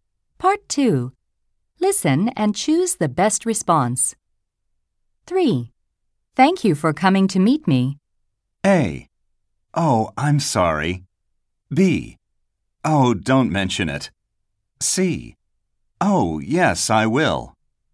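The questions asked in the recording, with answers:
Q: Thank you for coming to meet me.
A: B: Oh, don't mention it.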